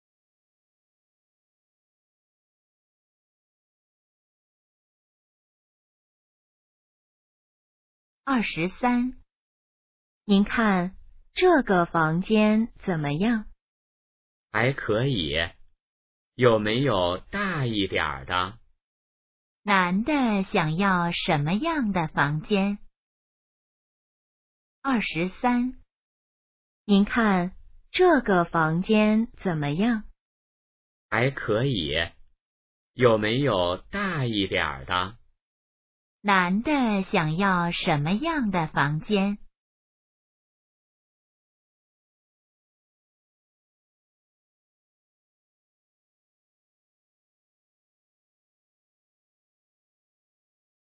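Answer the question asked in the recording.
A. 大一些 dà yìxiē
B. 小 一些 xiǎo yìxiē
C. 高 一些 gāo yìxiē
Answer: A. 大一些 dà yìxiē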